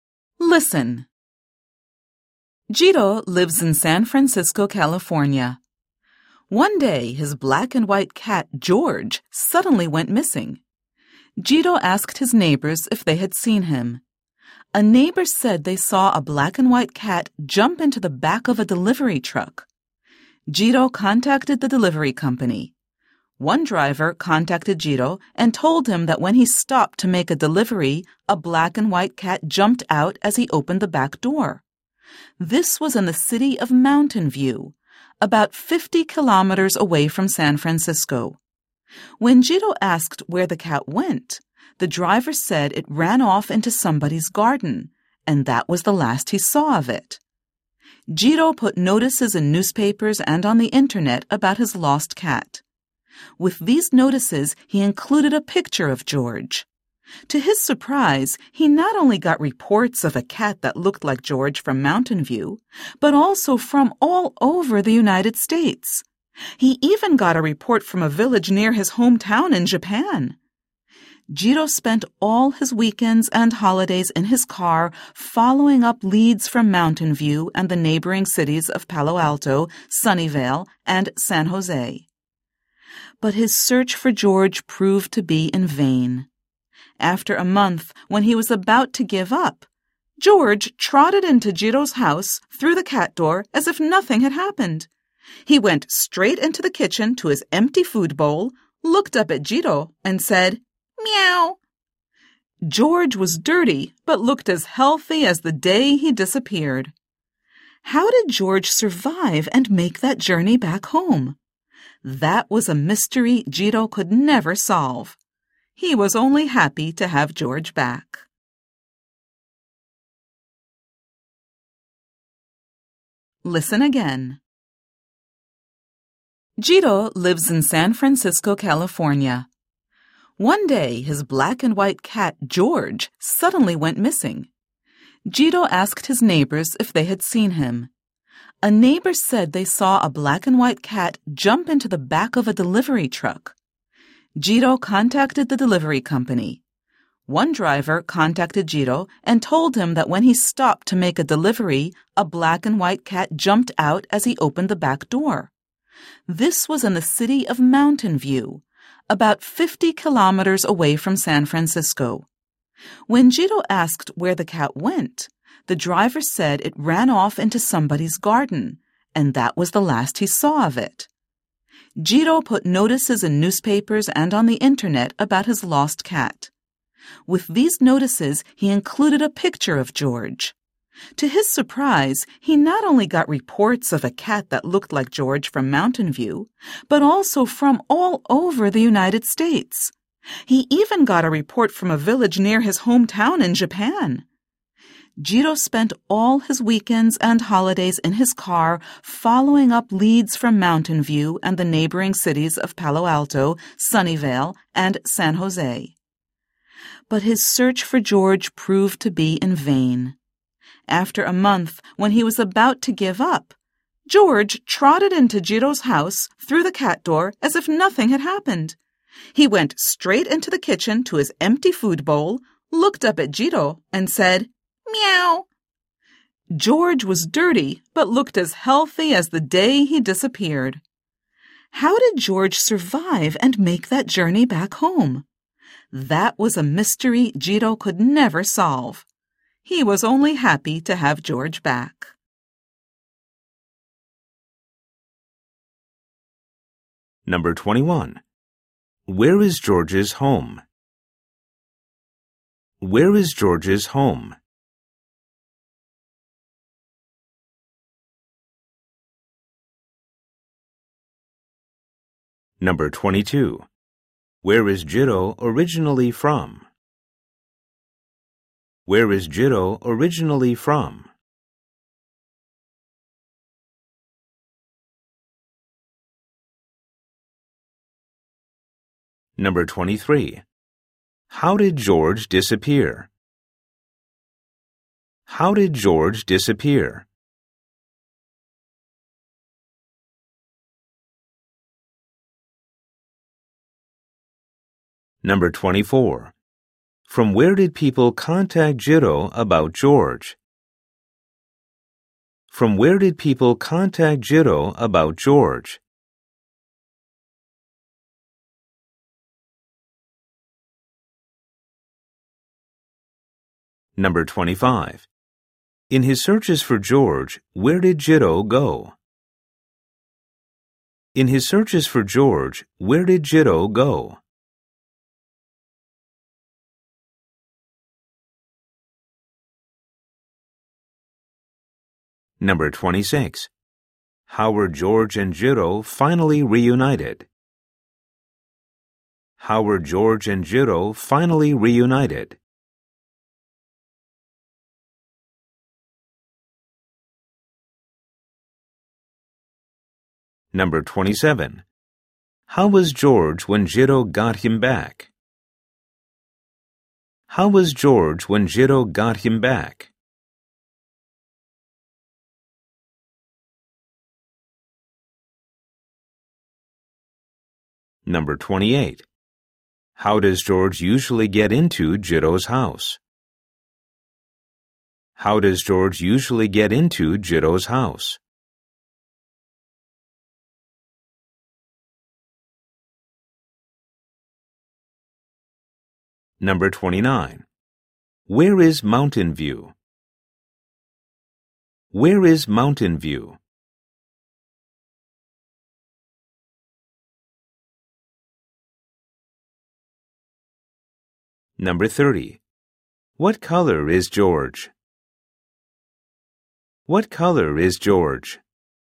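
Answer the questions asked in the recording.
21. San Francisco, California
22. Japan
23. He jumped into the back of a delivery truck
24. From Mountain View, all over the United States, and even near his hometown in Japan
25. Mountain View, Palo Alto, Sunnyvale and San Jose
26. George came back home by himself through the cat door
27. Dirty but healthy
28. Through the cat door
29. About 50 kilometers from San Francisco
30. Black and white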